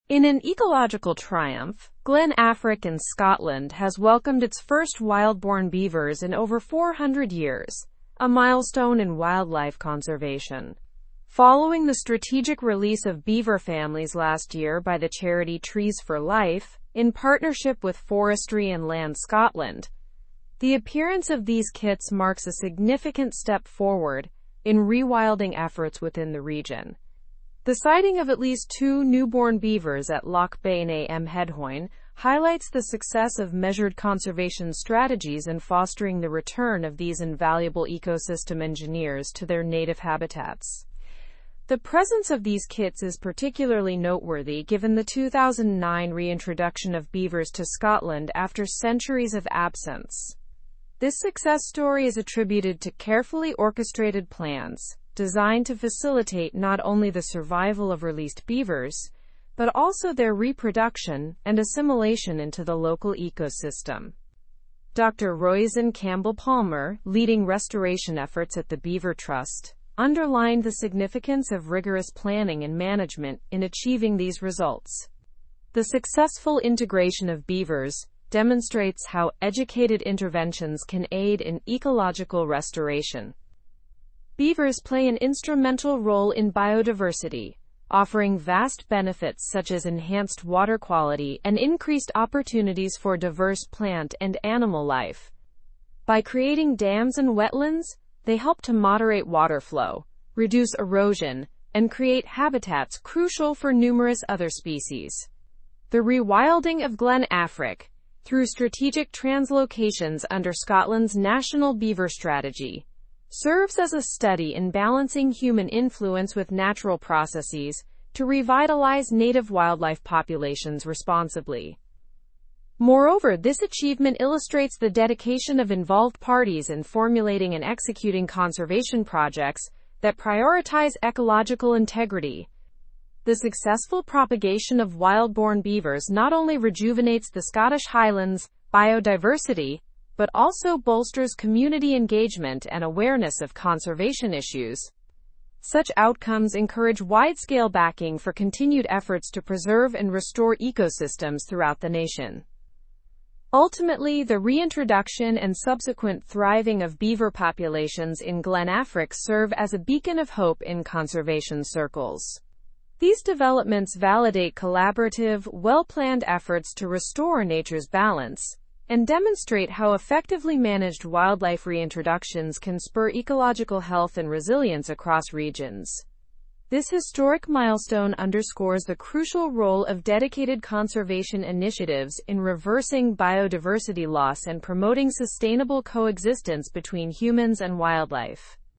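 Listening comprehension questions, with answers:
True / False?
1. Glen Affric in Scotland has welcomed its first wild-born beavers in over 400 years.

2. The rewilding of Glen Affric is not part of Scotland's National Beaver Strategy.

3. The sighting of newborn beavers indicates successful conservation strategies.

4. The unsuccessful integration of beavers is linked to random planning and lax management.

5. The reintroduction of beavers to Scotland started in 2020.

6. Successful wildlife reintroductions demonstrate managed efforts can boost ecological health.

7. Community disengagement is diminished through the eradication of wild-born beavers.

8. Beavers contribute to biodiversity by creating dams and wetlands.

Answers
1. True
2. False
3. True
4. False
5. False
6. True
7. False
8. True

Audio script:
In an ecological triumph, Glen Affric in Scotland has welcomed its first wild-born beavers in over 400 years, a milestone in wildlife conservation. 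Following the strategic release of beaver families last year by the charity Trees for Life in partnership with Forestry and Land Scotland, the appearance of these kits marks a significant step forward in rewilding efforts within the region. The sighting of at least two newborn beavers at Loch Beinn a Mheadhoin highlights the success of measured conservation strategies in fostering the return of these invaluable ecosystem engineers to their native habitats.
The presence of these kits is particularly noteworthy given the 2009 reintroduction of beavers to Scotland after centuries of absence. This success story is attributed to carefully orchestrated plans designed to facilitate not only the survival of released beavers but also their reproduction and assimilation into the local ecosystem. Dr. Roisin Campbell-Palmer, leading restoration efforts at the Beaver Trust, underlined the significance of rigorous planning and management in achieving these results. 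The successful integration of beavers demonstrates how educated interventions can aid in ecological restoration.
Beavers play an instrumental role in biodiversity, offering vast benefits such as enhanced water quality and increased opportunities for diverse plant and animal life. By creating dams and wetlands, they help to moderate water flow, reduce erosion, and create habitats crucial for numerous other species. The rewilding of Glen Affric, through strategic translocations under Scotland's National Beaver Strategy, serves as a study in balancing human influence with natural processes to revitalize native wildlife populations responsibly.
Moreover, this achievement illustrates the dedication of involved parties in formulating and executing conservation projects that prioritize ecological integrity. The successful propagation of wild-born beavers not only rejuvenates the Scottish Highlands' biodiversity but also bolsters community engagement and awareness of conservation issues. 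Such outcomes encourage widescale backing for continued efforts to preserve and restore ecosystems throughout the nation.
Ultimately, the reintroduction and subsequent thriving of beaver populations in Glen Affric serve as a beacon of hope in conservation circles. These developments validate collaborative, well-planned efforts to restore nature's balance and demonstrate how effectively managed wildlife reintroductions can spur ecological health and resilience across regions.
how effectively managed wildlife reintroductions can spur ecological health and resilience across regions. This historic milestone underscores the crucial role of dedicated conservation initiatives in reversing biodiversity loss and promoting sustainable coexistence between humans and wildlife.

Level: Level 4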